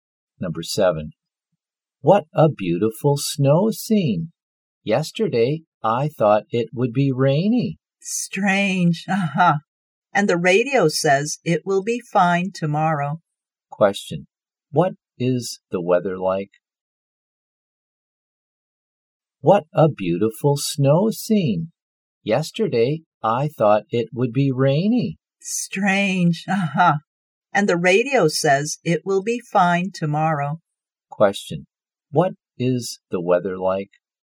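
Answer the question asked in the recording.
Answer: Snowy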